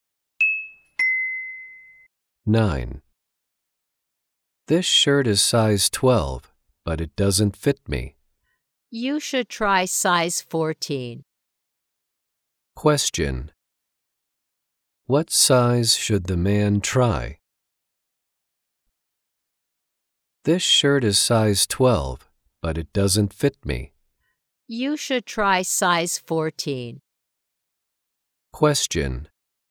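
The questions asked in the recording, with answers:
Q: What size should the man try?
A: Size 14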